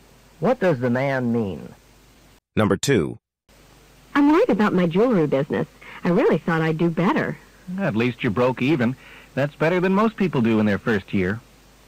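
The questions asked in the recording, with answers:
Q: What can be inferred from the conversation?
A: The woman's jewelry business didn't lose money in its first year; it broke even.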